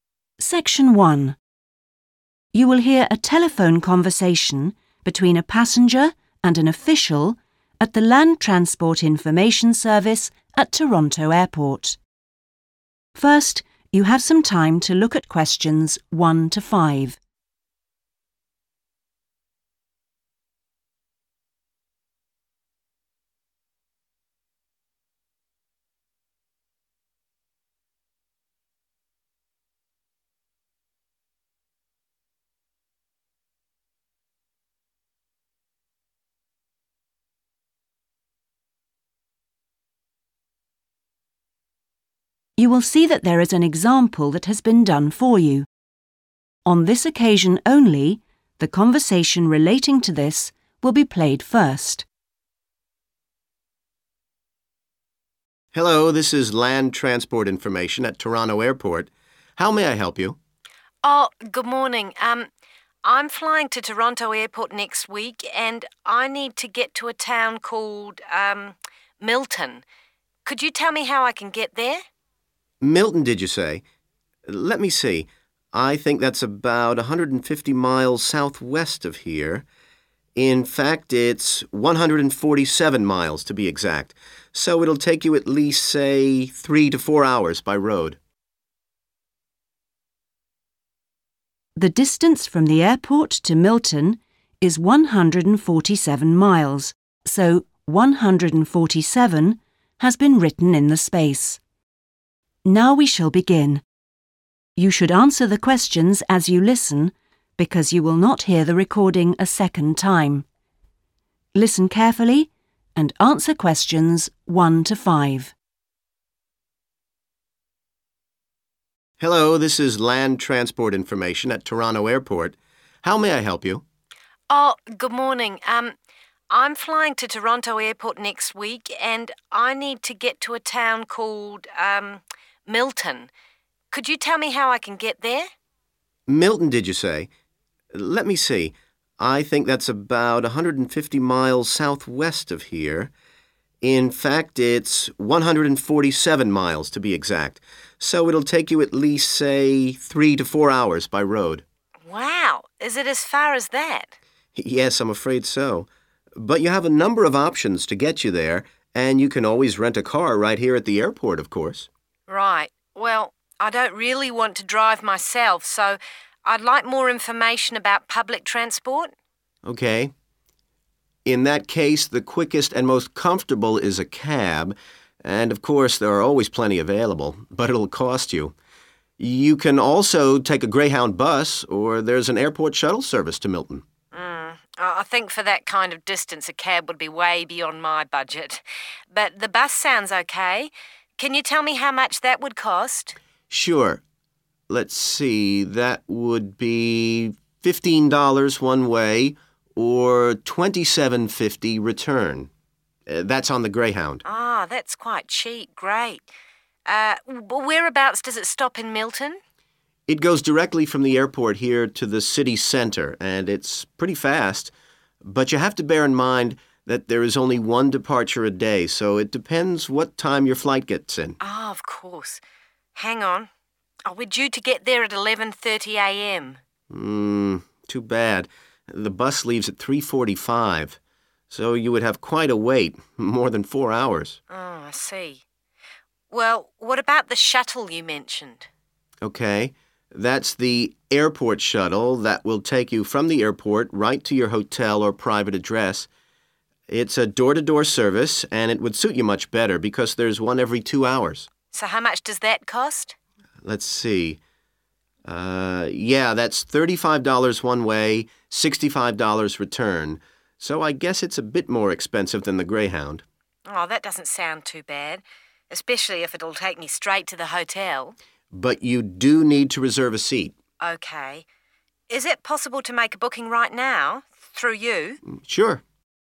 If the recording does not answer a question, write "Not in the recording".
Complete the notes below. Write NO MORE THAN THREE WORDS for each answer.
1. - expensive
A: a taxi / taxi / a cab / cab

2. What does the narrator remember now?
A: Not in the recording

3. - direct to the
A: city centre / city center

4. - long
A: wait

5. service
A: door-to-door

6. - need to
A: reserve a seat / reserve

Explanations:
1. The correct answer is taxi/cab because the man suggests it as a transportation option. He mentions that it is comfortable but warns that 'it'll cost you,' and the woman later agrees it is too expensive for her budget. This matches the note which describes this specific transport option as 'expensive.'
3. The correct answer is "city centre/center" because the man explains that the Greyhound bus travels from the airport straight to the middle of Milton. He uses the word "directly," which matches the word "direct" in the notes.
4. The correct answer is 'wait' because the man explains that the woman will arrive at the airport at 11:30 am, but the Greyhound bus does not leave until 3:45 pm. This creates a gap of more than four hours where she has to stay at the airport. The man calls this period of time 'a wait'. In the notes, 'long wait' matches this description.
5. The correct answer is "door-to-door" because the man uses this specific phrase when describing the benefits of the Airport Shuttle. He explains that this shuttle is convenient because it brings passengers from the airport all the way to their hotel or a private house without them needing to find extra transport in between.
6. The correct answer is "reserve (a seat)" because it is a specific requirement mentioned by the transport worker when explaining how the Airport Shuttle works. Unlike a regular bus or taxi, this service requires the passenger to save a spot by booking ahead of time. Keyword used: 'reserve'.